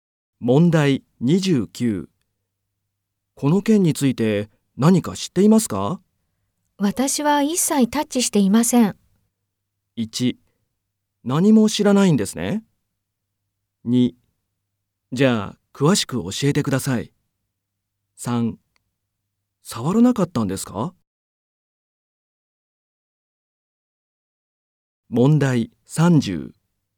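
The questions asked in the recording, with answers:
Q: この件について何か知っていますか?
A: 1: 何も知らないんですね。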